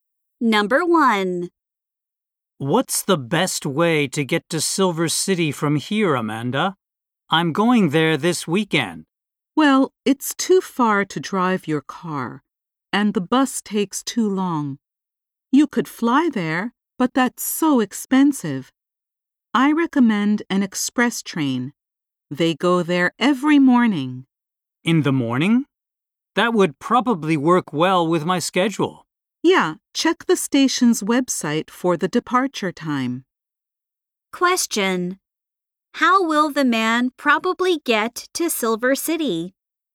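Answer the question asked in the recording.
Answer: By express train.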